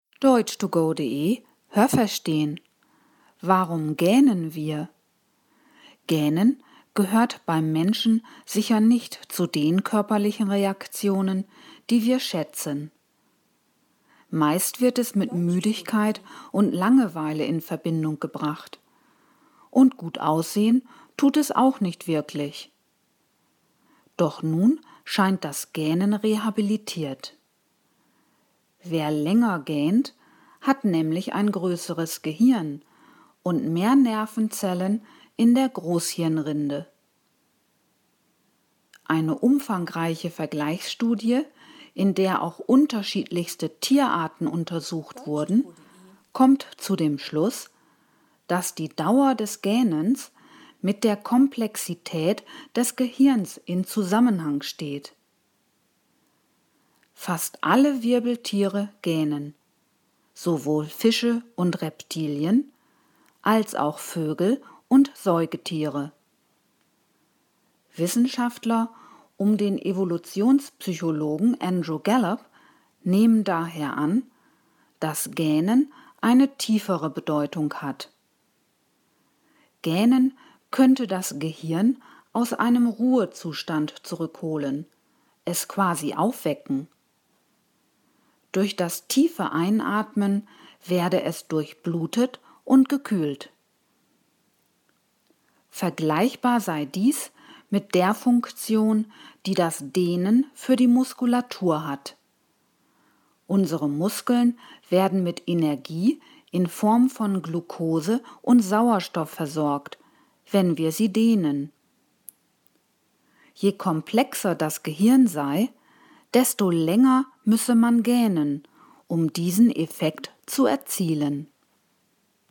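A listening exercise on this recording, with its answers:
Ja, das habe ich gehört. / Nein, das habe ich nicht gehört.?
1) Mit Gähnen verbindet man vor allem positive Vorstellungen.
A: Nein, das habe ich nicht gehört.

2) Wer länger gähnt, hat einen größeren Kopf.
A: Nein, das habe ich nicht gehört.

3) Die Dauer des Gähnens gibt Auskunft über die Anzahl der Nervenzellen in der Muskulatur.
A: Nein, das habe ich nicht gehört.

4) In einer Vergleichsstudie wurden auch verschiedenste Tierarten untersucht.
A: Ja, das habe ich gehört.

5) Auch Fische gähnen.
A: Ja, das habe ich gehört.

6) Das Gähnen versetzt unser Gehirn in einen Ruhezustand.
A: Nein, das habe ich nicht gehört.

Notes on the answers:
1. Meist wird es mit Müdigkeit und Langeweile in Verbindung gebracht.
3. Es handelt sich um Nerven in der Großhirnrinde (= Cortex, der äußere Teil des Gehirns).
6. Man nimmt an, dass das Gähnen das Gehirn aus einem Ruhezustand zurückholt.

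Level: C1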